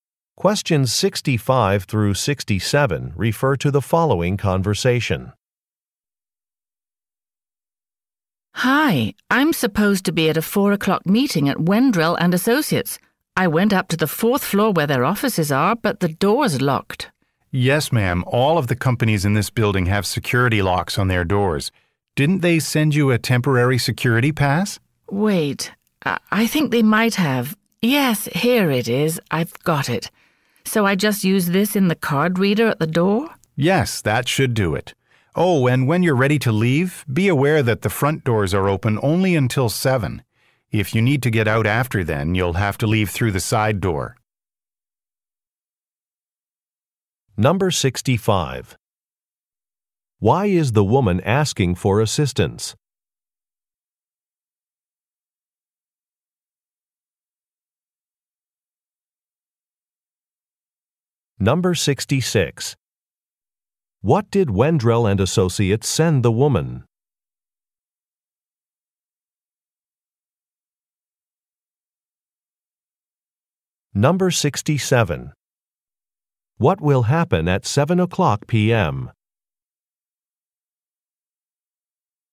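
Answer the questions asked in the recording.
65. The office door is locked
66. A temporary security pass
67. The front doors will close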